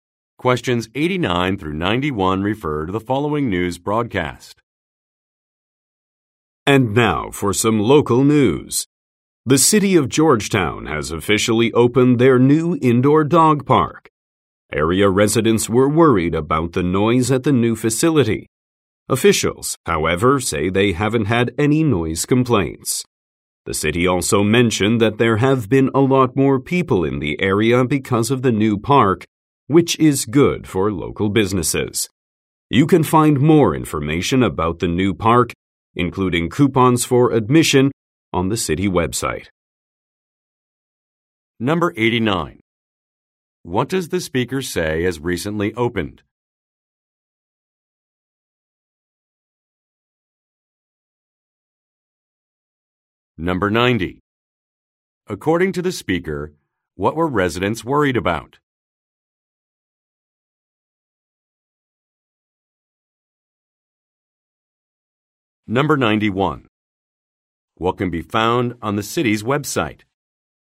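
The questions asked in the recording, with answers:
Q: What does the speaker say has recently opened?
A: An indoor dog park

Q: According to the speaker, what were residents worried about?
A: Noise

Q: What can be found on the city's website?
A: More information and admission coupons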